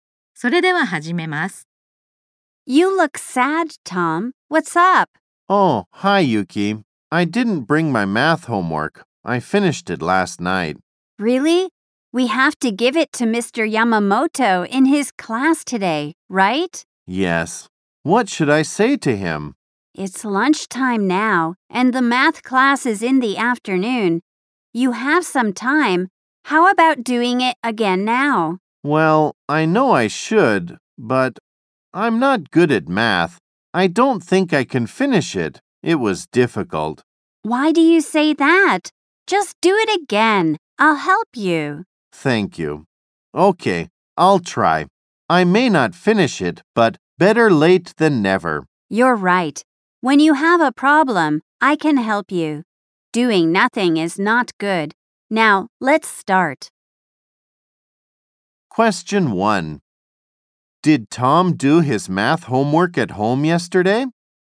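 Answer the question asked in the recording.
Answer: Yes, he did.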